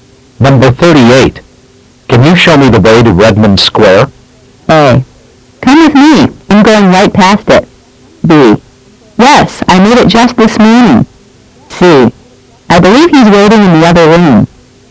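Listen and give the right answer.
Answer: A: Come with me. I'm going right past it.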